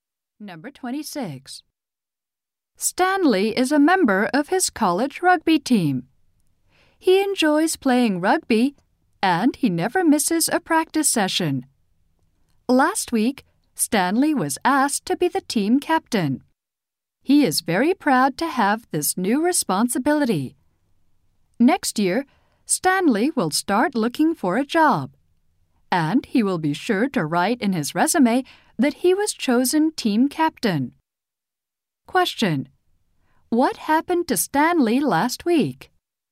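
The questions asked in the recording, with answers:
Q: What happened to Stanley last week?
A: He was asked to be team captain.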